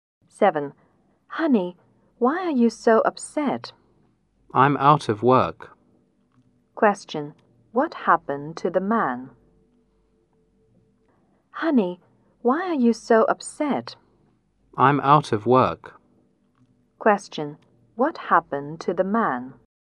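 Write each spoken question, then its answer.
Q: What happened to the man?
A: He lost his job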